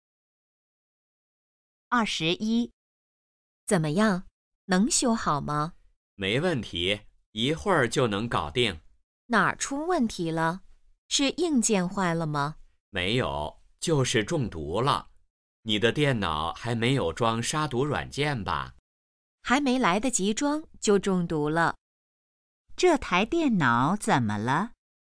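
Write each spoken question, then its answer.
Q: 这台电脑怎么了?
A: 中毒了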